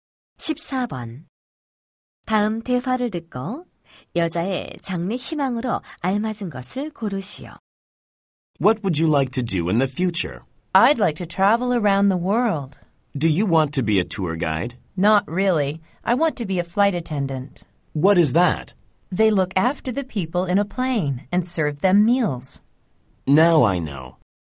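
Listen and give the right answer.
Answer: 승무원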